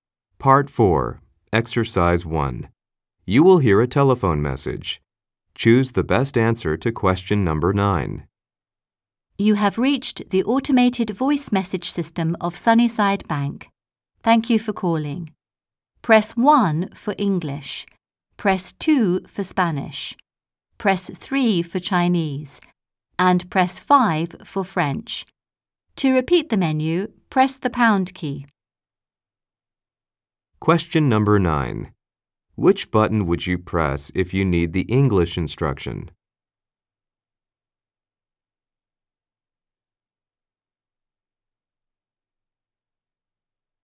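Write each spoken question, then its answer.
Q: Which button would you press if you need the English instruction?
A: Press 1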